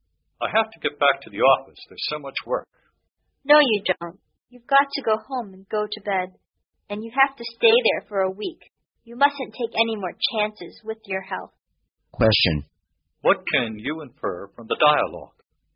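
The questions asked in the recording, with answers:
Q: What can you infer from the dialogue?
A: The man is ill and should go home and rest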